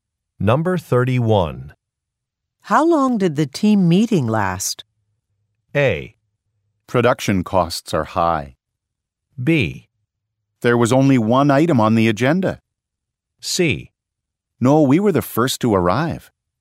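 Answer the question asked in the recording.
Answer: B: There was only one item on the agenda.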